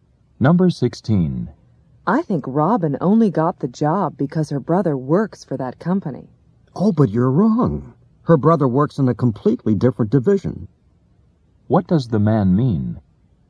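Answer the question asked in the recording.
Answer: Robin didn't get the job because of her brother.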